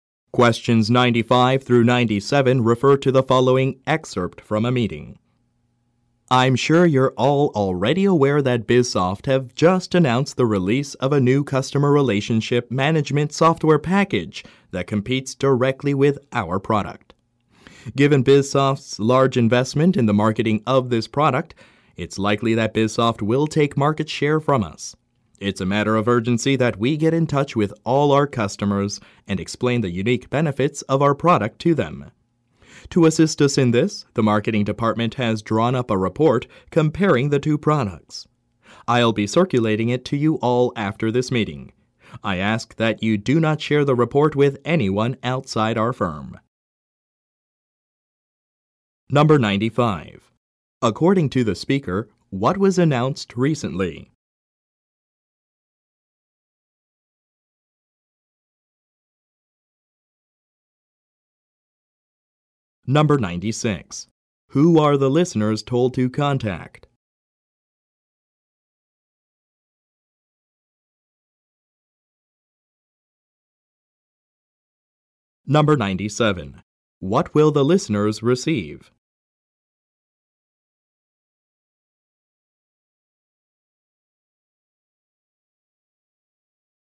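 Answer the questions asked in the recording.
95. A competitor (BizSoft) released a new customer relationship management software package
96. All their customers
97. A report comparing the two products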